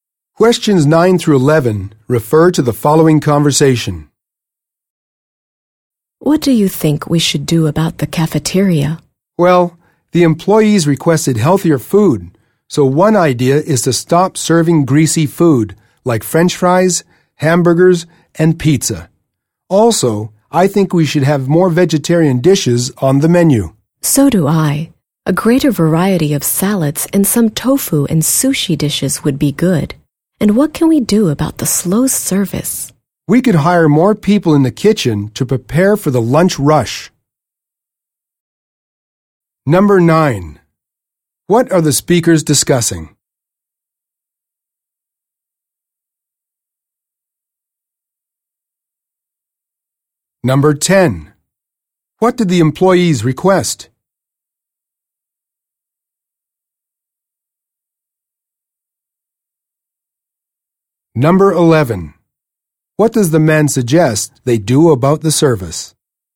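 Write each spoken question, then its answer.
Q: What are the speakers discussing?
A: Improving the cafeteria

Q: What did the employees request?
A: Healthier food

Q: What does the man suggest they do about the service?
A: Hire more kitchen staff for the lunch rush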